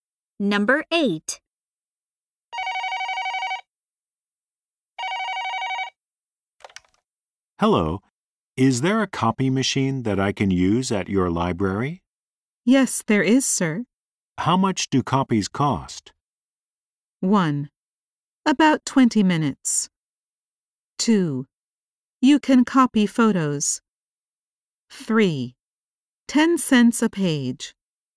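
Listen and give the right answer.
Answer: 3: 10 cents a page.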